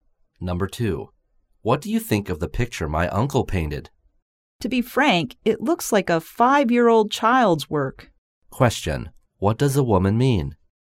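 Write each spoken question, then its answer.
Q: What does a woman mean?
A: She thinks the picture is poorly painted, like a child's work.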